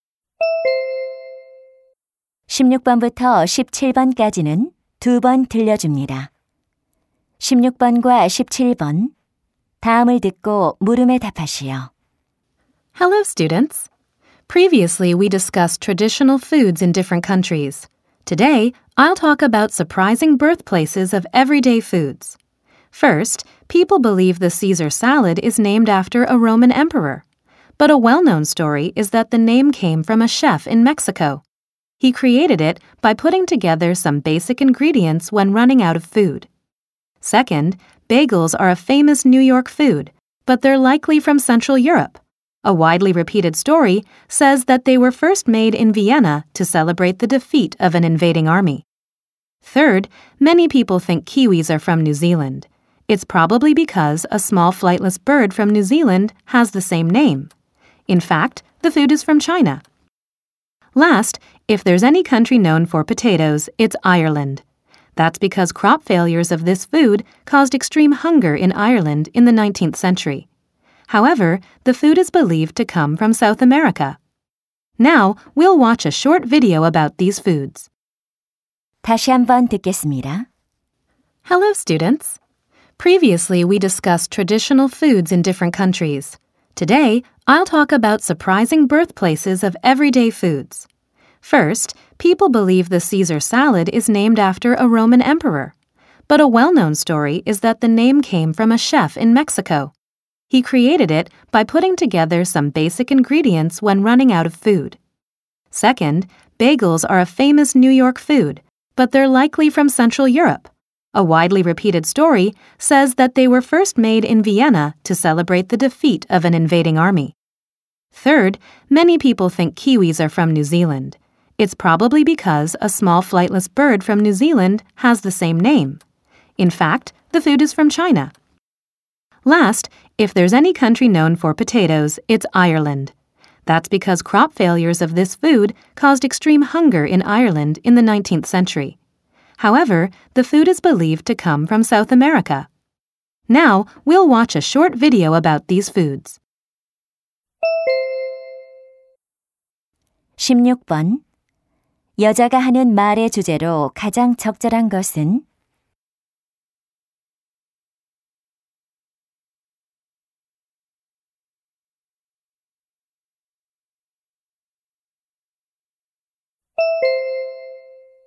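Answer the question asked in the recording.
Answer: 일상 음식들의 의외의 원산지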